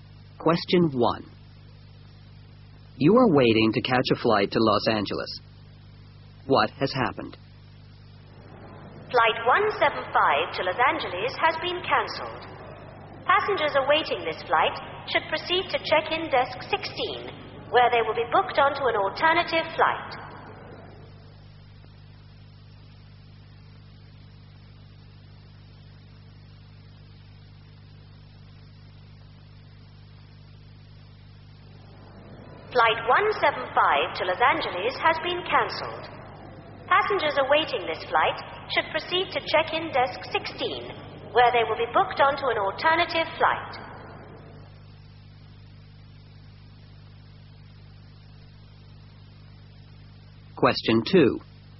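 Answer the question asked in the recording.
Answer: Flight 175 to Los Angeles has been cancelled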